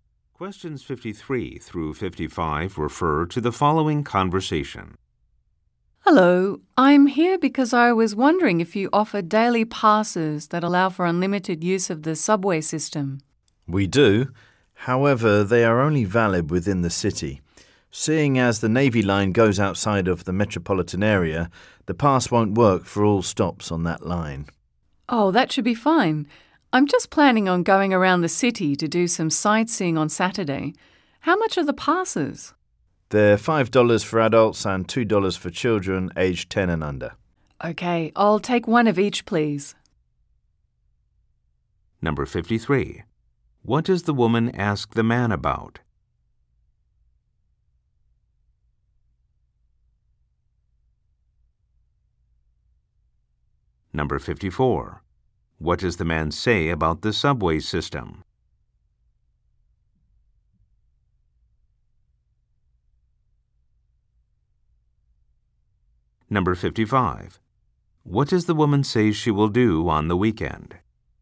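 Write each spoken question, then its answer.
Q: What does the woman ask the man about?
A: Daily passes for the subway

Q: What does the man say about the subway system?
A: The pass isn't valid outside the city, so it won't work at all stops on the Navy line

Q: What does the woman say she will do on the weekend?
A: Go sightseeing around the city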